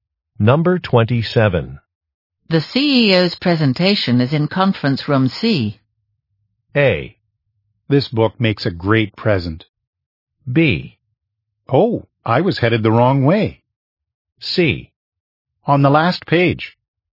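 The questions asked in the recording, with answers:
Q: The CEO's presentation is in conference room C.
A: B: Oh, I was headed the wrong way.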